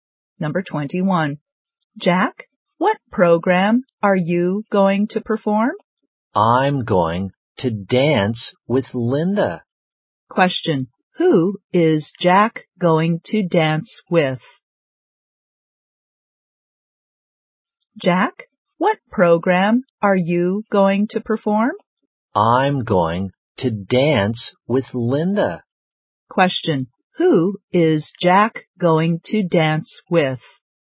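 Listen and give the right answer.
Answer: Linda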